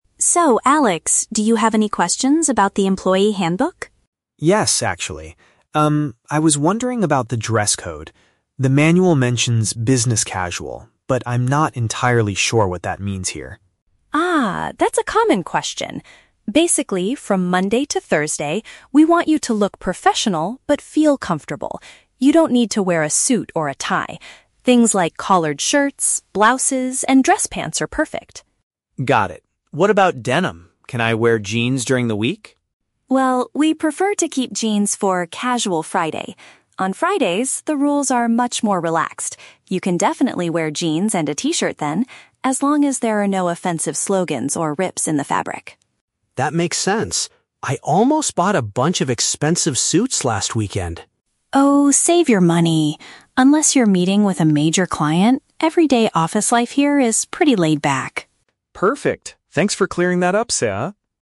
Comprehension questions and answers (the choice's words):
Listen to the conversation between an HR specialist and a new employee, then choose the correct answer (A, B, or C).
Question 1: What is the company's clothing policy for most of the week?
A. Staff must wear a traditional suit and tie.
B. Employees should choose neat but comfortable attire.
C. Workers are required to put on a company uniform.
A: Employees should choose neat but comfortable attire.

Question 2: What is an acceptable outfit choice for "Casual Friday"?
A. Denim trousers and basic shirts.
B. T-shirts with inappropriate words printed on them.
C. Expensive designer clothes and sports shoes.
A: Denim trousers and basic shirts.

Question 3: What was Alex close to doing last weekend?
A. Throwing away the official employee manual.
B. Scheduling a formal meeting with a major client.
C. Purchasing costly formal businesswear.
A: Purchasing costly formal businesswear.

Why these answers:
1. Sarah says that from Monday to Thursday, employees should "look professional but feel comfortable." Option B uses synonyms ("neat but comfortable attire") to express this exact idea.
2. Sarah states that on Fridays, employees can wear "jeans and a t-shirt." Option A paraphrases this as "denim trousers and basic shirts."
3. Alex admits, "I almost bought a bunch of expensive suits last weekend!" Option C accurately paraphrases this action as "purchasing costly formal businesswear."

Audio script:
Sarah: So, Alex, do you have any questions about the employee handbook?
Alex: Yes, actually. Um, I was wondering about the dress code. The manual mentions 'Business Casual', but I'm not entirely sure what that means here.
Sarah: Ah, that's a common question! Basically, from Monday to Thursday, we want you to look professional but feel comfortable. You don't need to wear a suit or a tie. Things like collared shirts, blouses, and dress pants are perfect.
Alex: Got it. What about denim? Can I wear jeans during the week?
Sarah: Well, we prefer to keep jeans for 'Casual Friday'. On Fridays, the rules are much more relaxed. You can definitely wear jeans and a t-shirt then, as long as there are no offensive slogans or rips in the fabric.
Alex: That makes sense. I almost bought a bunch of expensive suits last weekend!
Sarah: Oh, save your money! Unless you're meeting with a major client, everyday office life here is pretty laid-back.
Alex: Perfect. Thanks for clearing that up, Sarah.